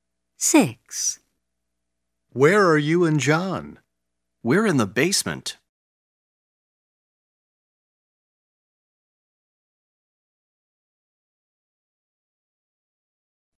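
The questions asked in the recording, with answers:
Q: Where are you and John?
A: In the basement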